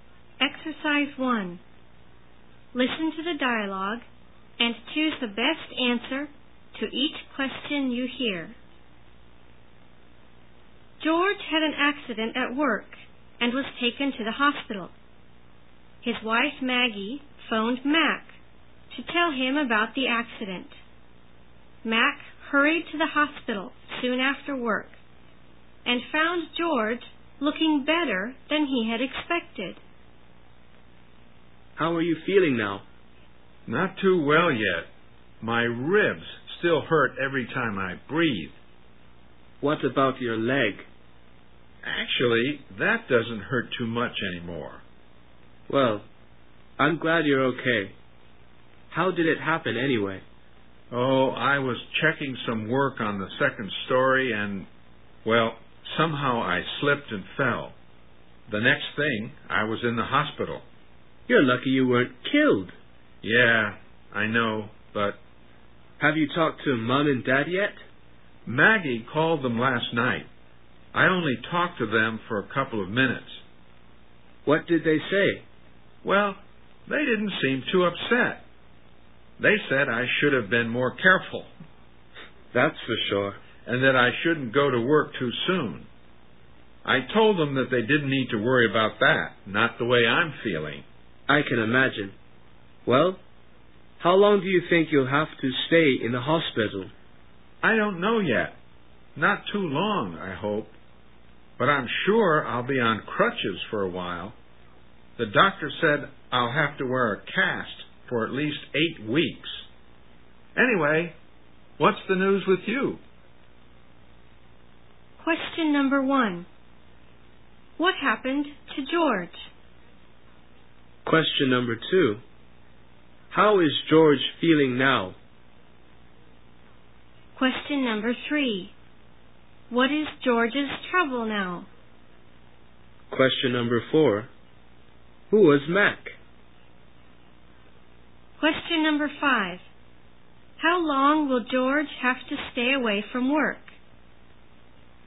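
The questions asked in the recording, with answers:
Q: What happened to George?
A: He slipped and fell at work and was taken to the hospital.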